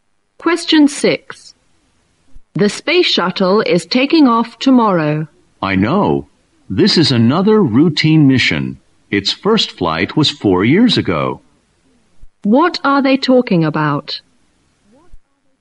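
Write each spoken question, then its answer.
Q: What are they talking about?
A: The space shuttle launch tomorrow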